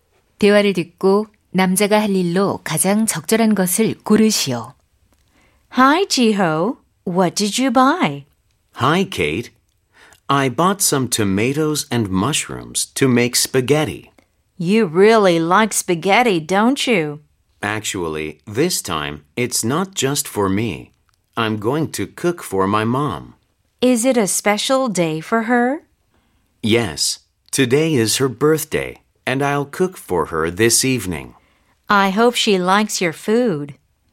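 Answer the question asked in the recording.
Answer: 엄마를 위해 스파게티 요리하기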